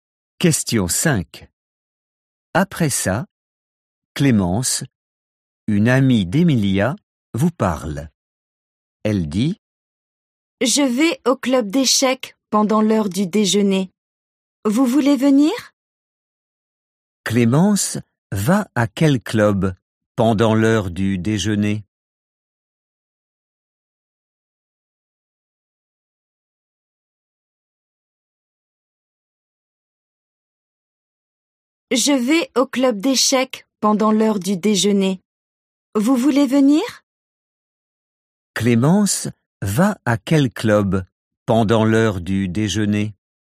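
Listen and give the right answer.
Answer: Le club d'échecs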